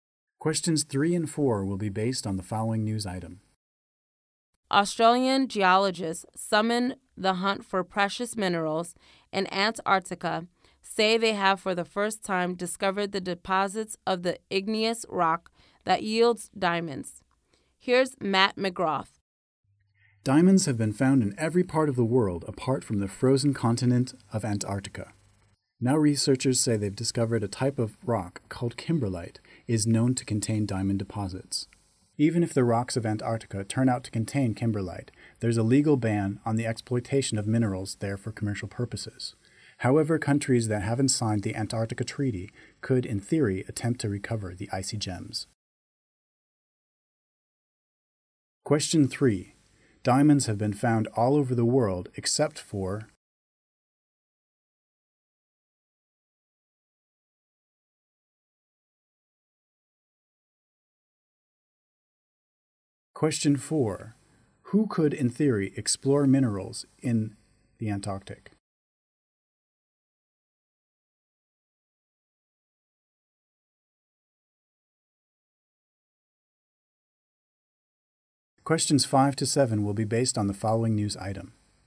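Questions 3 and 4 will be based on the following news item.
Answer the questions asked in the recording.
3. Antarctica
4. Countries that haven't signed the Antarctic Treaty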